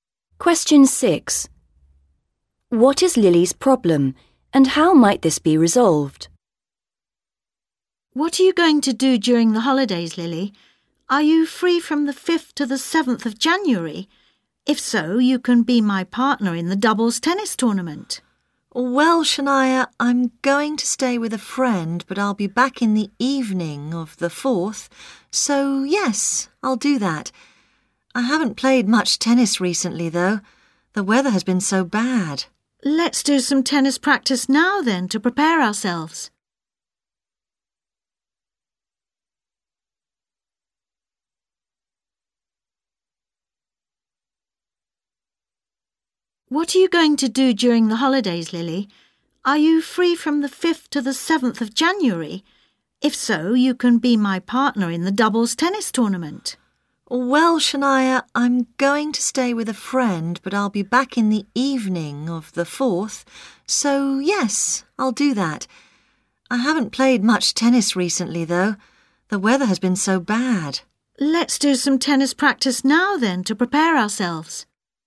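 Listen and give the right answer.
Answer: She hasn't played much tennis recently; they can practise now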